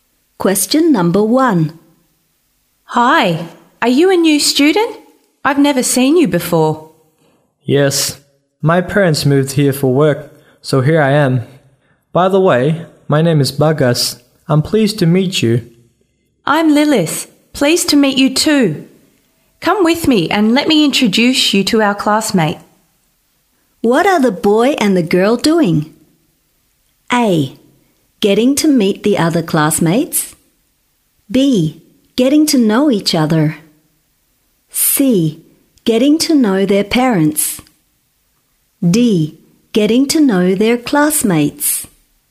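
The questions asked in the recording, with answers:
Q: What are the boy and the girl doing?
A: B: Getting to know each other.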